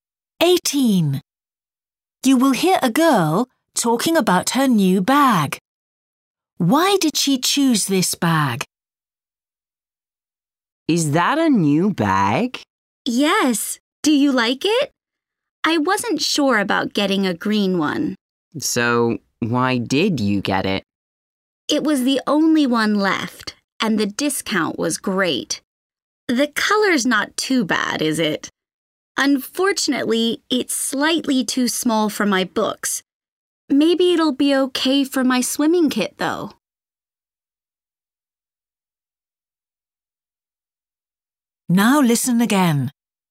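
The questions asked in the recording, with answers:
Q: Why did she choose this bag?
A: It was the only one left and it had a good discount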